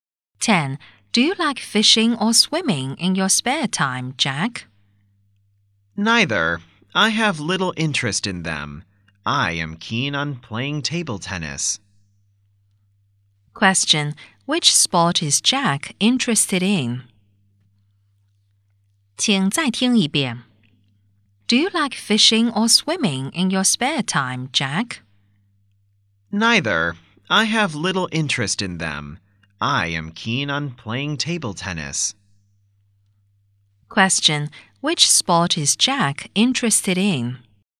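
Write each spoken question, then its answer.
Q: Which sport is Jack interested in?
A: Table tennis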